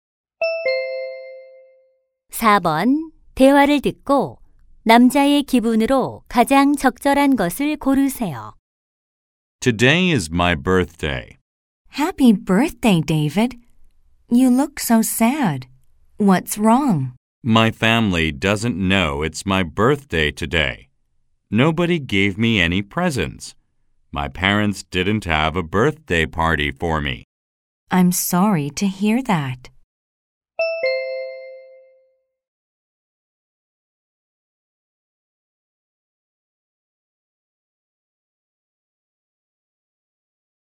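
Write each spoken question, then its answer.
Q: 대화를 듣고 남자의 기분으로 가장 적절한 것을 고르세요.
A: 슬픈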